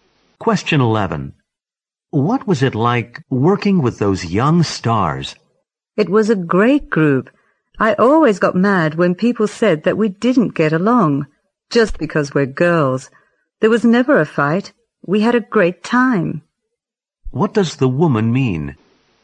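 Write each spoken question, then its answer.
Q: What does the woman mean?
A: The young stars got along well and had a great time working together.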